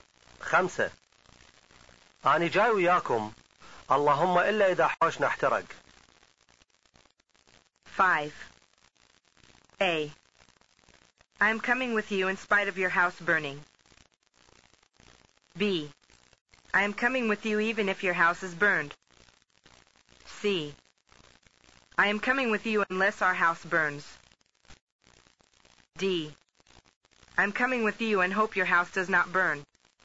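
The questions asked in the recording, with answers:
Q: أنا جاي وياكم. اللهم إلا إذا حوشنا احترق.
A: C: I am coming with you unless our house burns.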